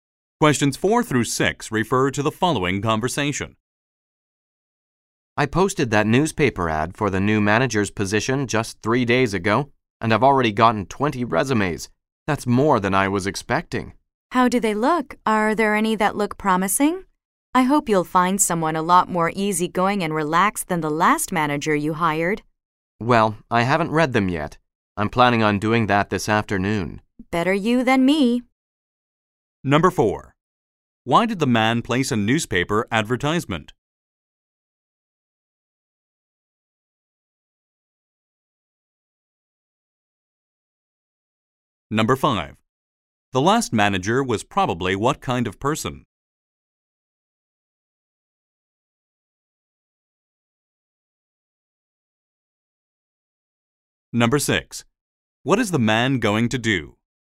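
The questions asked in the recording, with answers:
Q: Why did the man place a newspaper advertisement?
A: To hire a new manager

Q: The last manager was probably what kind of person?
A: Not easygoing; tense

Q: What is the man going to do?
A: Read the resumes this afternoon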